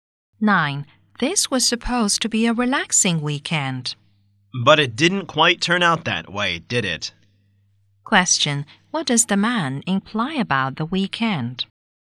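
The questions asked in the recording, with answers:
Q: What does the man imply about the weekend?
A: It was not relaxing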